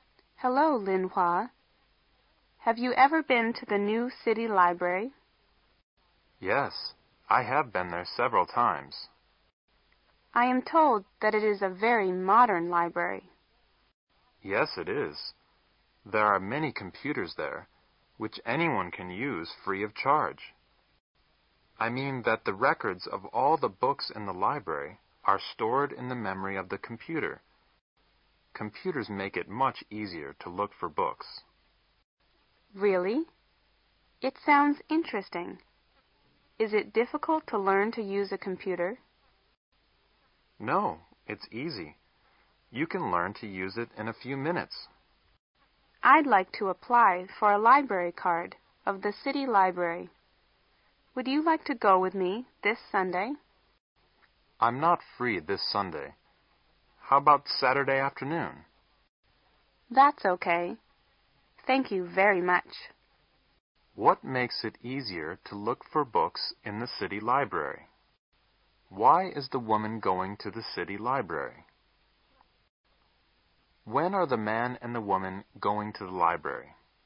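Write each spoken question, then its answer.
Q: What makes it easier to look for books in the city library?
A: Computers

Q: When are the man and the woman going to the library?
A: On Saturday afternoon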